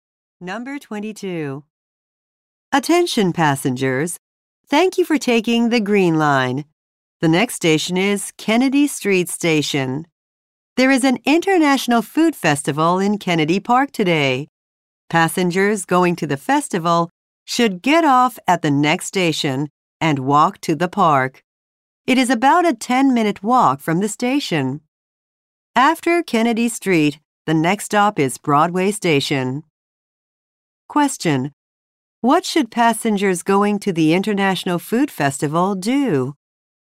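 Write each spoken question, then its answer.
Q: What should passengers going to the International Food Festival do?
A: Get off at Kennedy Street Station and walk to the park.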